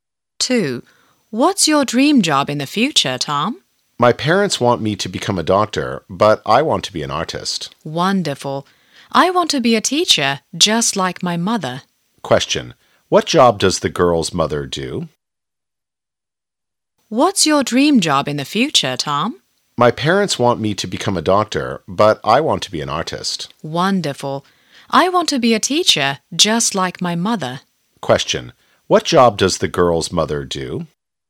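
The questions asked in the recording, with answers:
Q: What job does the girl's mother do?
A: A teacher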